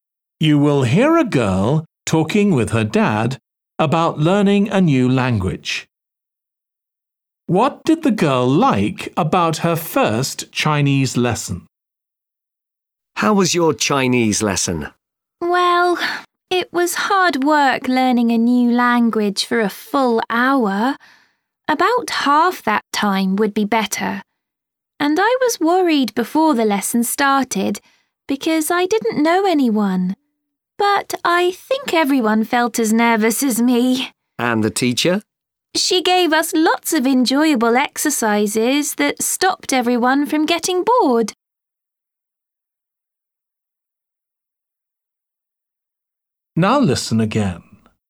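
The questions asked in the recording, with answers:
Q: What did the girl like about her first Chinese lesson?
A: The teacher's enjoyable exercises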